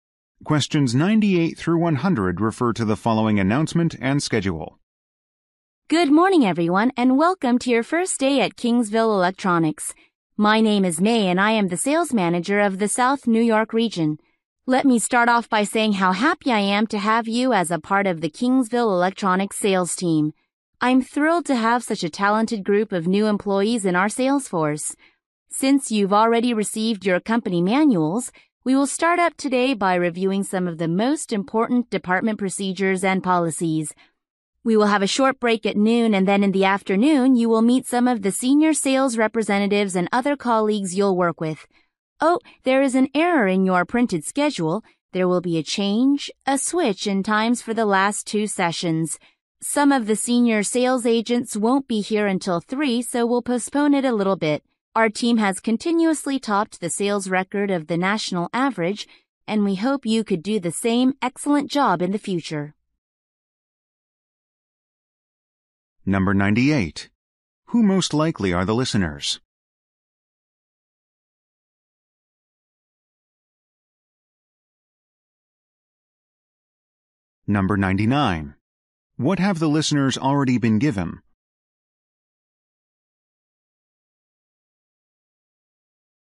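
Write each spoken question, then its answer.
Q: Who most likely are the listeners?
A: New sales employees

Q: What have the listeners already been given?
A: Company manuals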